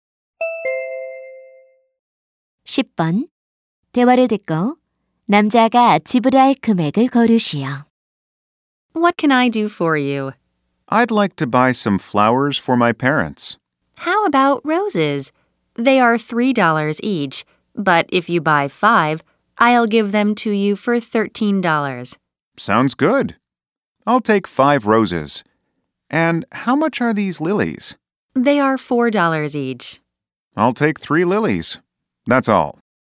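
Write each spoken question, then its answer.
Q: 대화를 듣고 남자가 지불할 금액을 고르시오.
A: 25달러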